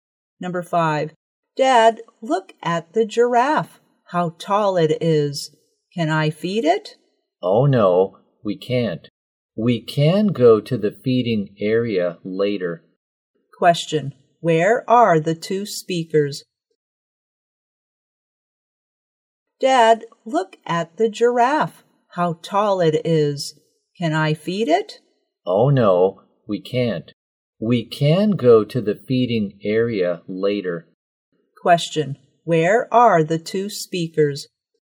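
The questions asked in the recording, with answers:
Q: Question, where are the two speakers?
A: At the zoo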